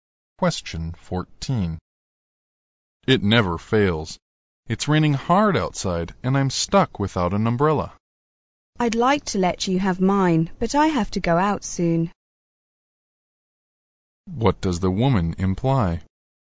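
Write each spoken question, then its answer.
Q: What does the woman imply?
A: She can't lend him her umbrella because she needs it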